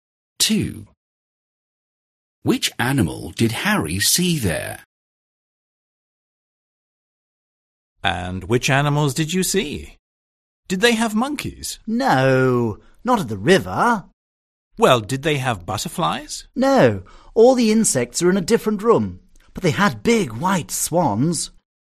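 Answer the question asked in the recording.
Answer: swans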